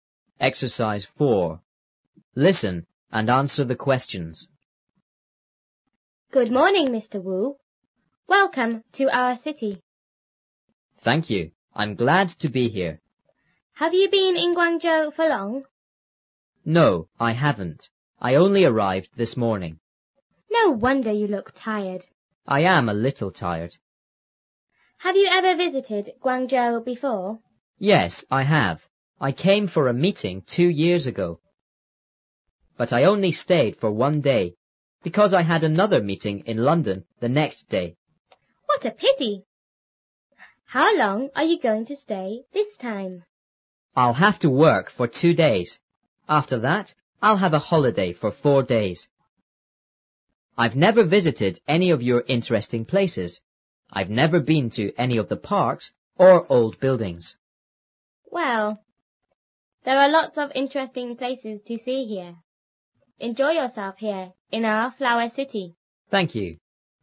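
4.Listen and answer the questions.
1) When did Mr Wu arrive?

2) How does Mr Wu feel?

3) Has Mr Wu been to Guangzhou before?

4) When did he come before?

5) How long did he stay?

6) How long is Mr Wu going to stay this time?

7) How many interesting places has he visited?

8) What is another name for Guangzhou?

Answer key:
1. This morning.
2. A little tired.
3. Yes, he has.
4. Two years ago.
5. One day.
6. Six days (2 days of work and 4 days of holiday).
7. None.
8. The flower city.

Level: 初中英语广州版3B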